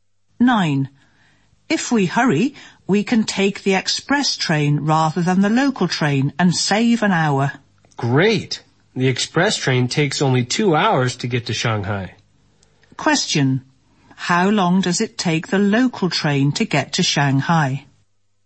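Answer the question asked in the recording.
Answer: 3 hours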